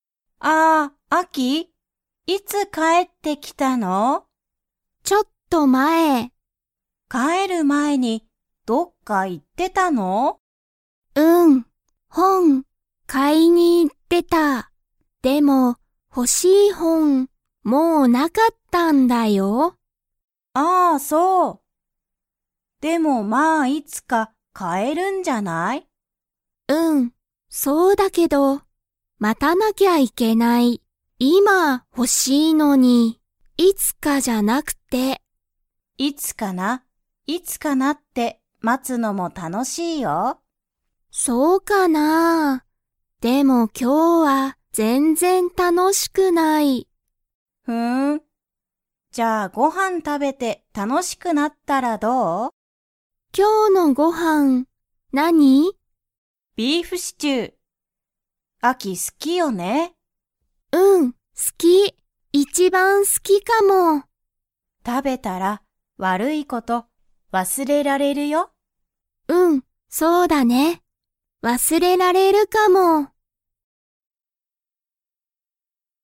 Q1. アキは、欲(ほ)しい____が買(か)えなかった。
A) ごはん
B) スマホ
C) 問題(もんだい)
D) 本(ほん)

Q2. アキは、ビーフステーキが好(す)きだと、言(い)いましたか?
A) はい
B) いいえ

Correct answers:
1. 本(ほん)
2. いいえ

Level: Level 2

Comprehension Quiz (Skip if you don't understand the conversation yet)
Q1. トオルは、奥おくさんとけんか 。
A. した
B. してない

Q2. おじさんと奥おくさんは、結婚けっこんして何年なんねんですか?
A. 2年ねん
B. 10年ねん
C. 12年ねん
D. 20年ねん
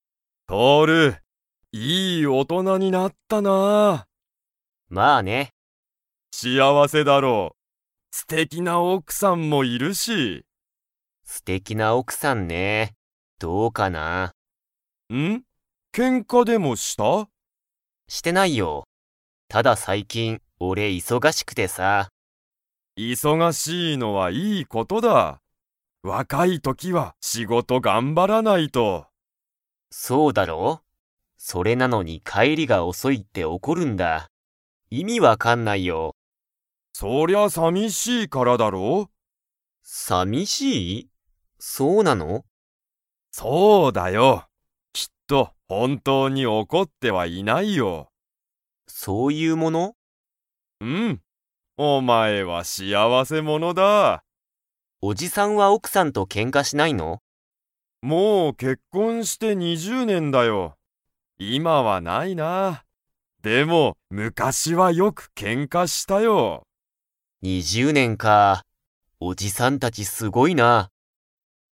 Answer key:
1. してない
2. 20年ねん

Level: Level 4

